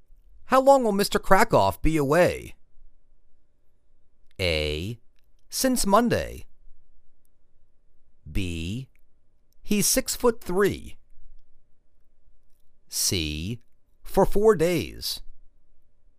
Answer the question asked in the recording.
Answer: For four days